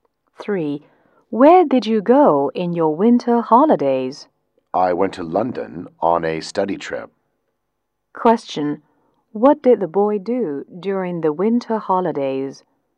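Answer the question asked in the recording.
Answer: He went to London on a study trip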